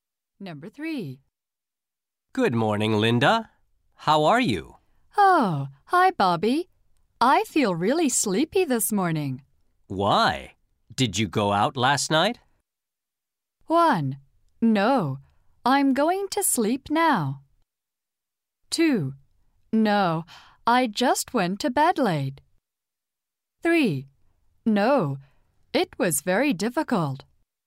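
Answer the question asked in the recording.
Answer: 2: No. I just went to bed late.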